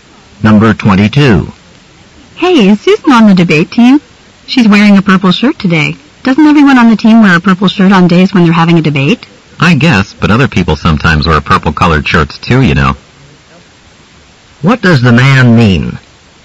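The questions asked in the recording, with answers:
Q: What does the man mean?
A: Her purple shirt doesn't necessarily mean Susan is on the debate team.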